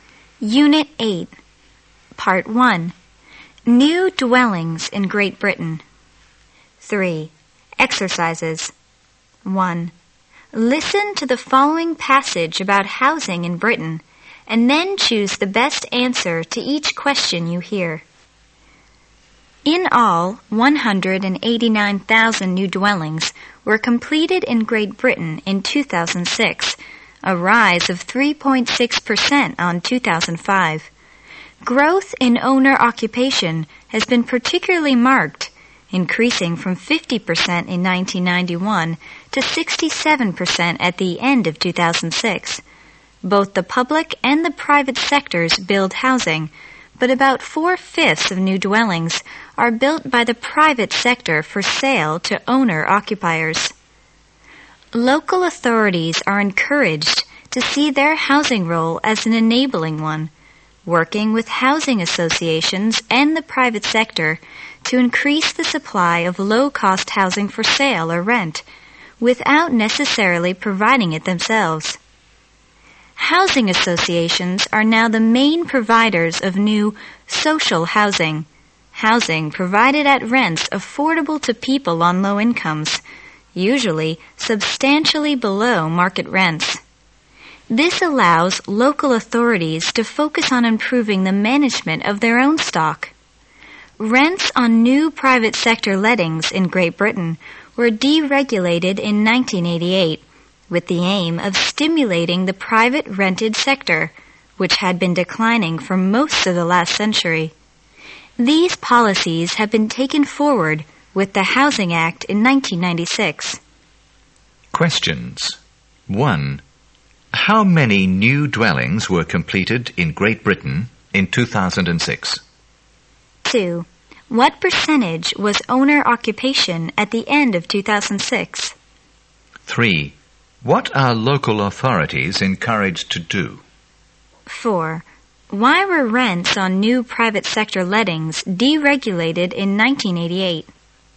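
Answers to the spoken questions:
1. 189,000
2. 67%
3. See their housing role as an enabling one, working with housing associations and the private sector to increase the supply of low-cost housing
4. To stimulate the private rented sector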